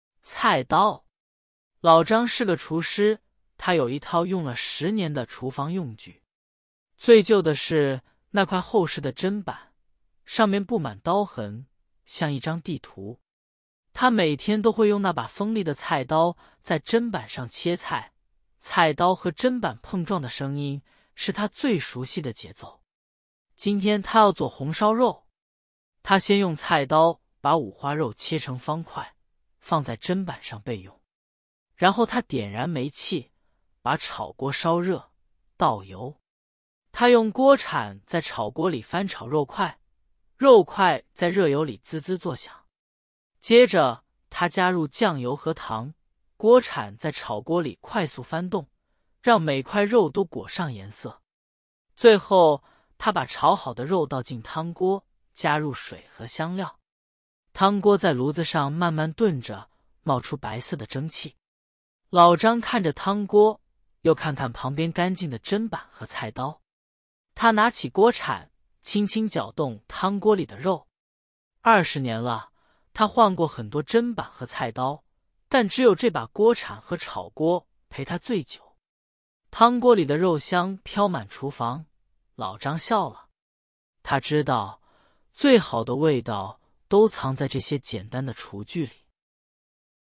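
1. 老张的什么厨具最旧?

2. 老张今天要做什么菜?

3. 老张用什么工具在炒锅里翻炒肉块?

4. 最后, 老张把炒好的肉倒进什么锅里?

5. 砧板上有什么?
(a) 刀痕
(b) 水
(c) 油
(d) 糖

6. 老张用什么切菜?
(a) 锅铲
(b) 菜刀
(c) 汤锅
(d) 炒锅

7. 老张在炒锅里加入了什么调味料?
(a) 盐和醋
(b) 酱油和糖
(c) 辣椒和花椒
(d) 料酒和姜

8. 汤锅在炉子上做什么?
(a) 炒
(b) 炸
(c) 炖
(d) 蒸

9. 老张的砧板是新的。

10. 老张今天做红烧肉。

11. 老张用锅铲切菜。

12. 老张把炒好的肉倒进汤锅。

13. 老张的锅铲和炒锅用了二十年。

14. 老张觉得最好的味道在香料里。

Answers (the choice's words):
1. 砧板
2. 红烧肉
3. 锅铲
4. 汤锅
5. 刀痕
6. 菜刀
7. 酱油和糖
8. 炖
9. 错
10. 对
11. 错
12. 对
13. 对
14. 错

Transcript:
老张是个厨师,他有一套用了十年的厨房用具。最旧的是那块厚实的砧板,上面布满刀痕,像一张地图。他每天都会用那把锋利的菜刀在砧板上切菜,菜刀和砧板碰撞的声音,是他最熟悉的节奏。
今天他要做红烧肉。他先用菜刀把五花肉切成方块,放在砧板上备用。然后他点燃煤气,把炒锅烧热,倒油。他用锅铲在炒锅里翻炒肉块,肉块在热油里滋滋作响。接着他加入酱油和糖,锅铲在炒锅里快速翻动,让每块肉都裹上颜色。最后他把炒好的肉倒进汤锅,加入水和香料。
汤锅在炉子上慢慢炖着,冒出白色的蒸汽。老张看着汤锅,又看看旁边干净的砧板和菜刀。他拿起锅铲,轻轻搅动汤锅里的肉。二十年了,他换过很多砧板和菜刀,但只有这把锅铲和炒锅陪他最久。汤锅里的肉香飘满厨房,老张笑了。他知道,最好的味道,都藏在这些简单的厨具里。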